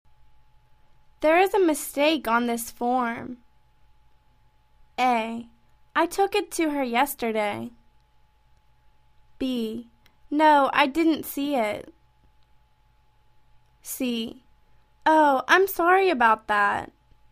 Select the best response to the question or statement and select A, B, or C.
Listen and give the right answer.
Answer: Oh, I'm sorry about that.